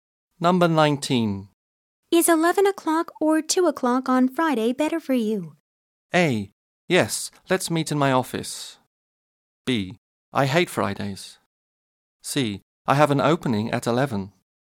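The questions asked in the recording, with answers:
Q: Is 11 o'clock or 2 o'clock on Friday better for you?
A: C: I have an opening at 11.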